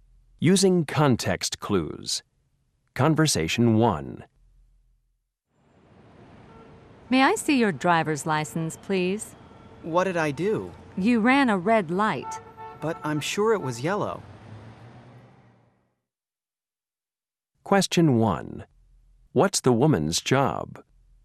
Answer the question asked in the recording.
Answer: Are you trying to argue with a police officer?